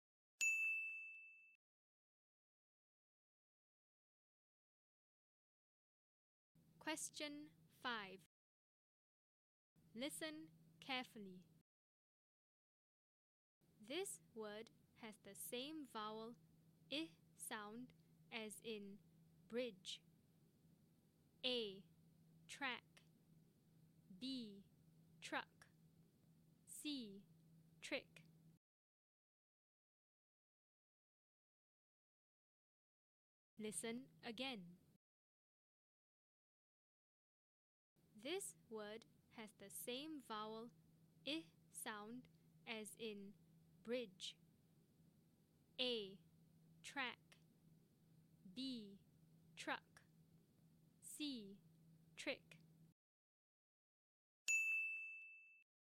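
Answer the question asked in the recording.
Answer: C: Trick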